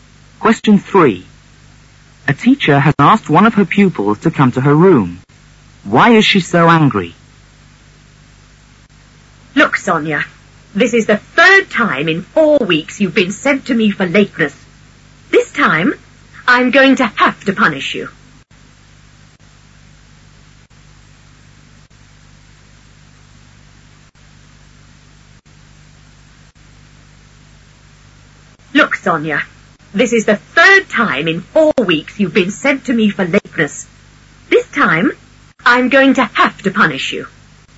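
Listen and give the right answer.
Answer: Sonia has been sent to her for lateness for the 3rd time in 4 weeks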